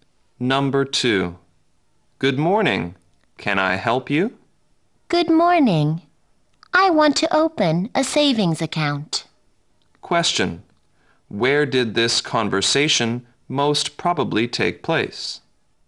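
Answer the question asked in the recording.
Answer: At a bank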